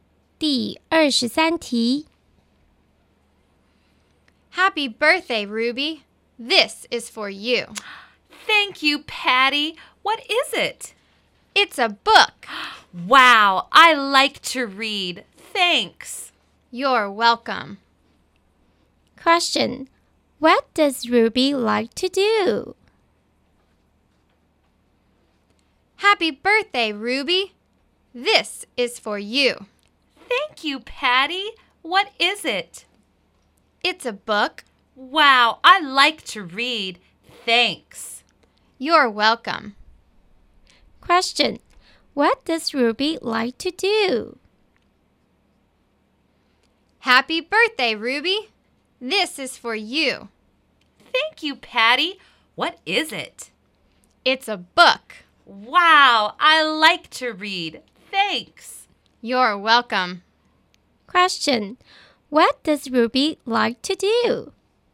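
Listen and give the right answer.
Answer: She likes to read.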